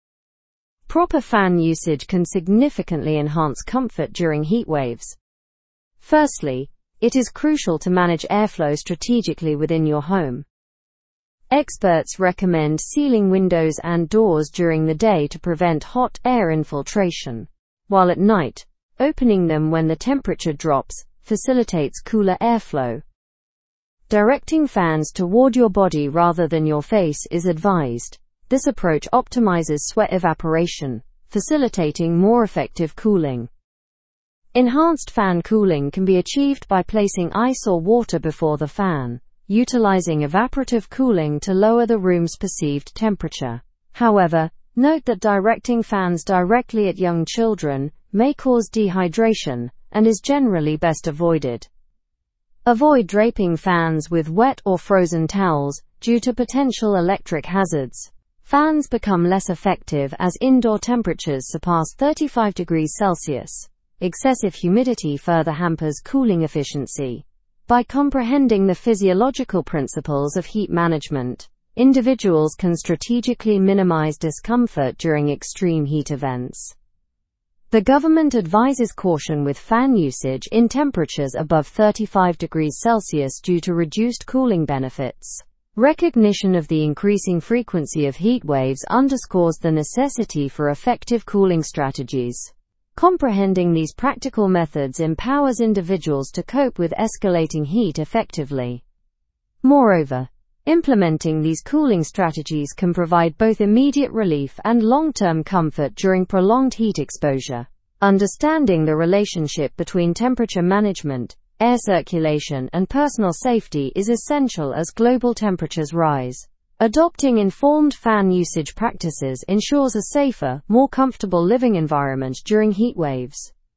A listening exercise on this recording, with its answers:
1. Why is strategic airflow management important during heatwaves?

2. What practice is suggested at night to facilitate cooler airflow?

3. How can evaporative cooling be achieved at home?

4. Why is directing fans at young children advised against?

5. What temperature is highlighted as a limit for fan efficiency?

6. What are the potential hazards of draping fans with wet towels?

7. What aspect of climate does the article emphasize as increasing in frequency?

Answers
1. Strategic airflow management is important to enhance cooling and comfort by optimizing natural airflow patterns.
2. Opening windows when temperatures drop at night is suggested to facilitate cooler airflow.
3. Evaporative cooling can be achieved by placing ice or water in front of a fan.
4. It is advised against because it may cause dehydration in young children.
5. Fan efficiency is highlighted to decrease above 35°C.
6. Draping fans with wet towels may pose electric hazards.
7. The article emphasizes that the frequency of heatwaves is increasing.

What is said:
Proper fan usage can significantly enhance comfort during heatwaves. Firstly, it is crucial to manage airflow strategically within your home. Experts recommend sealing windows and doors during the day to prevent hot air infiltration, while at night, opening them when the temperature drops facilitates cooler airflow.
Directing fans toward your body rather than your face is advised. This approach optimizes sweat evaporation, facilitating more effective cooling. Enhanced fan cooling can be achieved by placing ice or water before the fan, utilizing evaporative cooling to lower the room's perceived temperature. However, note that directing fans directly at young children may cause dehydration and is generally best avoided.
Avoid draping fans with wet or frozen towels due to potential electric hazards. Fans become less effective as indoor temperatures surpass 35°C; excessive humidity further hampers cooling efficiency. By comprehending the physiological principles of heat management, individuals can strategically minimize discomfort during extreme heat events.
The government advises caution with fan usage in temperatures above 35°C due to reduced cooling benefits. Recognition of the increasing frequency of heatwaves underscores the necessity for effective cooling strategies. Comprehending these practical methods empowers individuals to cope with escalating heat effectively.
Moreover, implementing these cooling strategies can provide both immediate relief and long-term comfort during prolonged heat exposure. Understanding the relationship between temperature management, air circulation, and personal safety is essential as global temperatures rise. Adopting informed fan usage practices ensures a safer, more comfortable living environment during heatwaves.

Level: (Level 4)